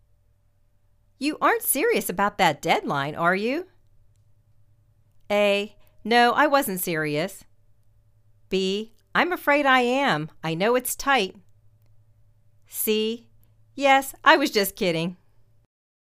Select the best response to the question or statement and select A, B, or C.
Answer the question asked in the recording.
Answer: I' m afraid I am. I know it's tight.